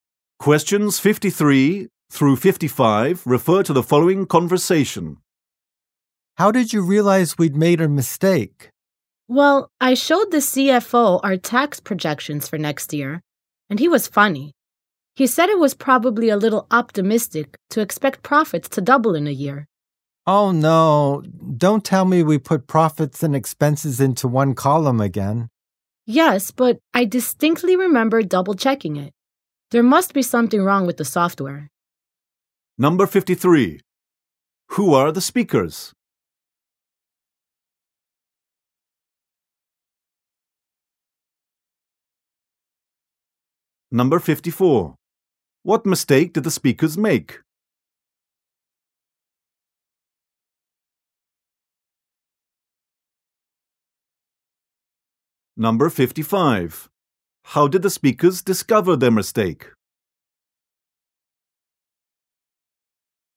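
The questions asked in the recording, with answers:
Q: What mistake did the speakers make?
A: They put profits and expenses in one column

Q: How did the speakers discover their mistake?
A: The CFO commented on the projections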